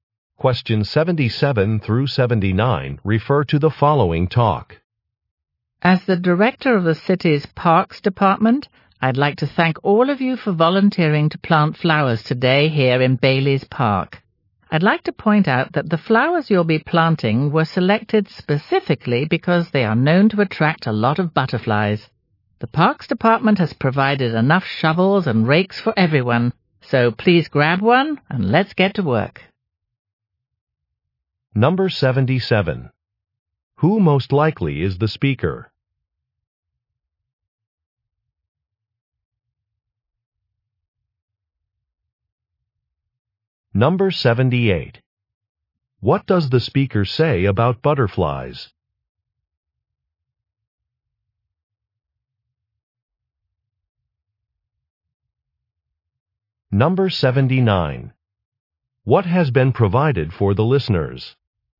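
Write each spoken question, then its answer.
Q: Who most likely is the speaker?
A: The director of the city's Parks Department

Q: What does the speaker say about butterflies?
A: The flowers attract them

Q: What has been provided for the listeners?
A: Shovels and rakes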